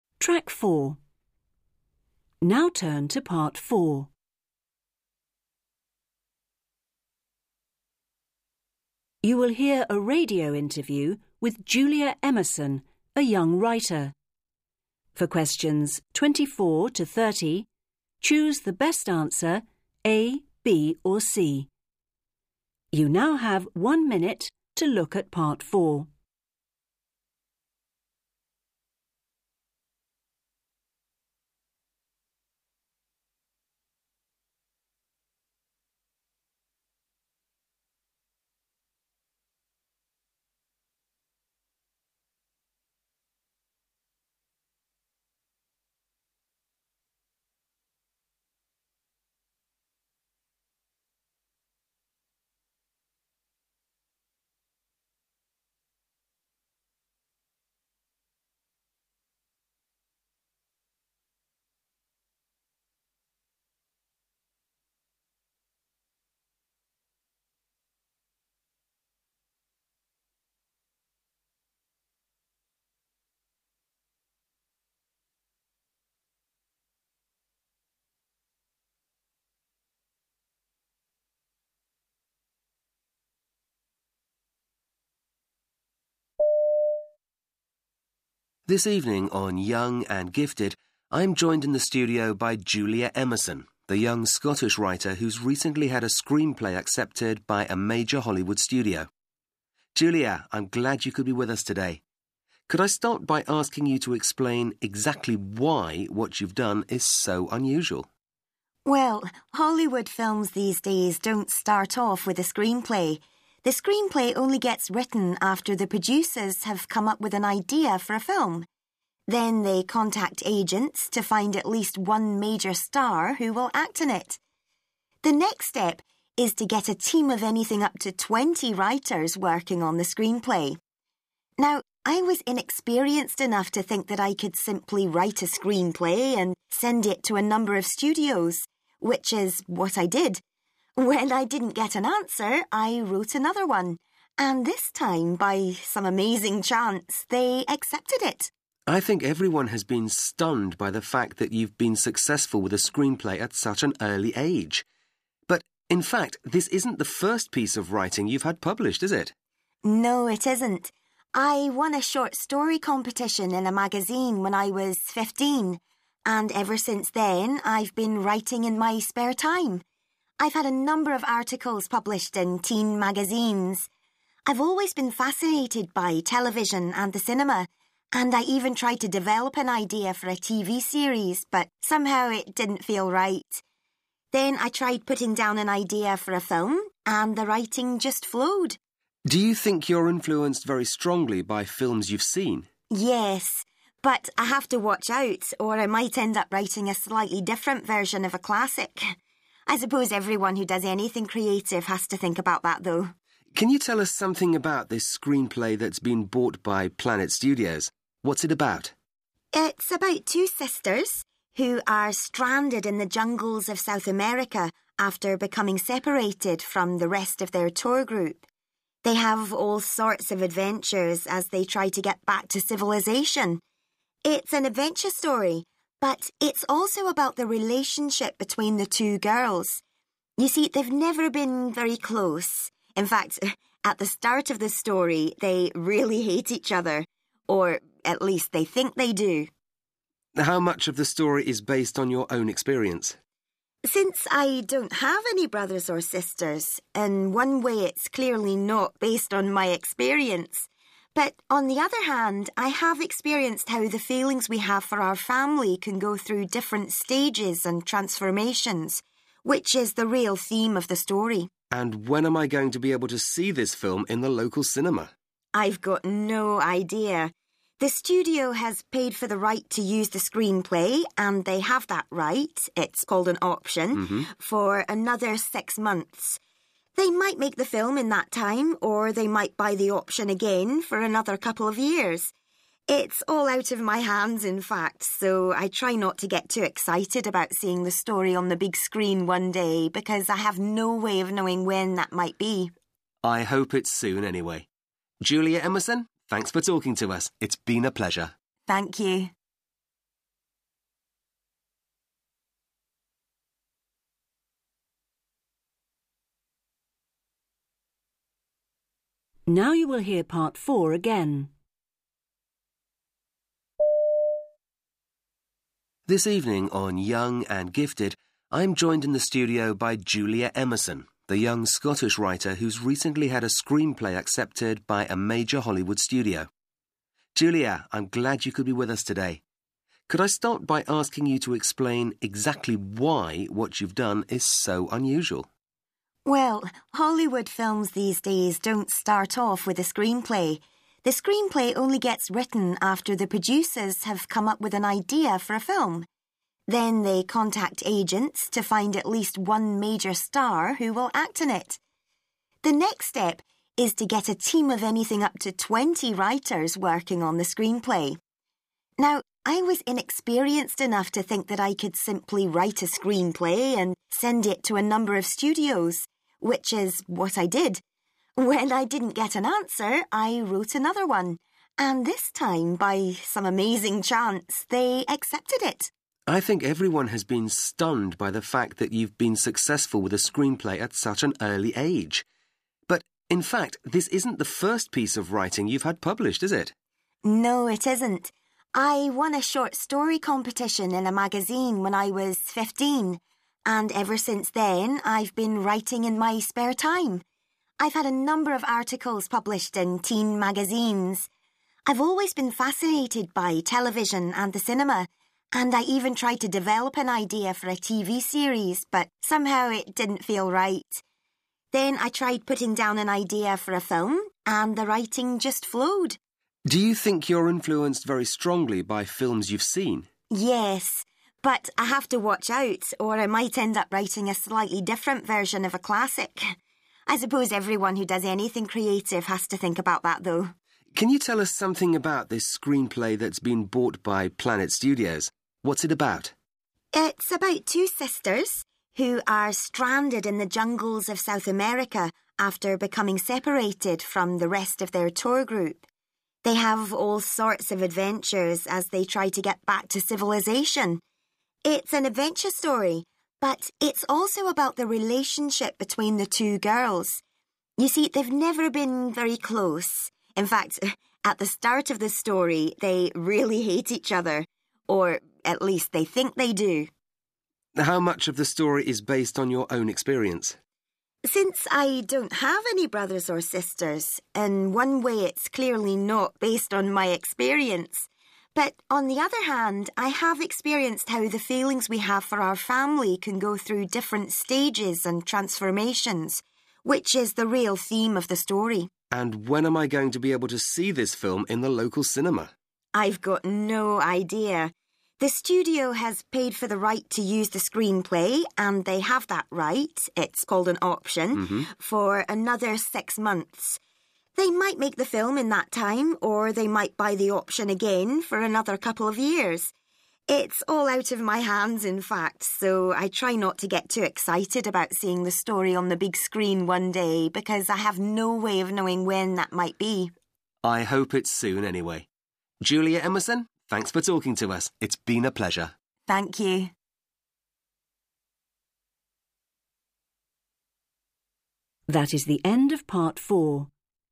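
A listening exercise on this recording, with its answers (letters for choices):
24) According to Julia, nowadays Hollywood producers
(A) usually think of ideas for films themselves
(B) write screenplays and contact stars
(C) contact agents to find writers for them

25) Julia says that she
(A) has written a number of successful screenplays for studios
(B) was lucky enough to have her first screenplay accepted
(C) was not discouraged by the lack of response from studios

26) Julia began writing in her spare time when she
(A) published some articles in a magazine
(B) had an idea for a TV series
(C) came first in a short-story competition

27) Julia says that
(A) she would like to write a version of classic film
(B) there is a danger she might imitate other films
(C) creative people should think a lot about films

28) Julia's screenplay is about two sisters who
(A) set out to try living in the jungle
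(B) find themselves in a difficult situation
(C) end up hating each other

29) The theme of the story is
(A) how out emotions about our family can change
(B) Julia's relationship with her brothers and sisters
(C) about the importance of having a family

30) It appears that the film based on Julia's screenplay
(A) must be made withing the next few months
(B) will be made when the studio has paid Julia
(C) might never be made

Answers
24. A
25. C
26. C
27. B
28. B
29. A
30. C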